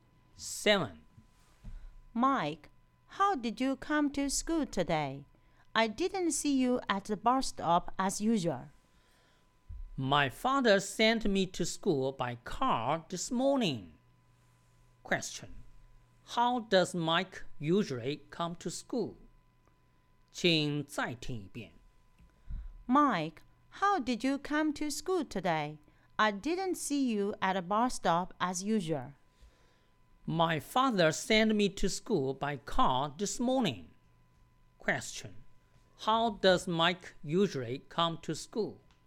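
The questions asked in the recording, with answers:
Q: How does Mike usually come to school?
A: By bus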